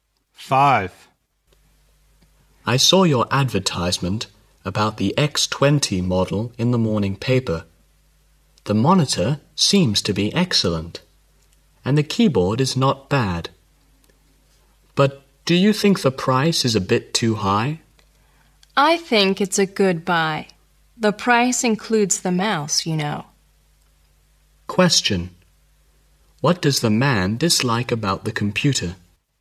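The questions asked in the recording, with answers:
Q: What does the man dislike about the computer?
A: The price (too high)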